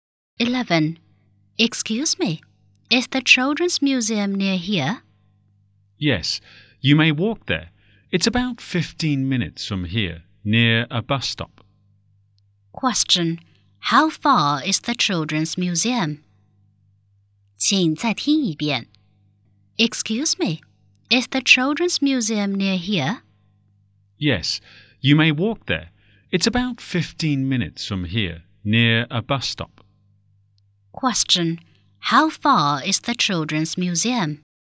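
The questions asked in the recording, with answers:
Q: How far is the Children's Museum?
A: About 15 minutes' walk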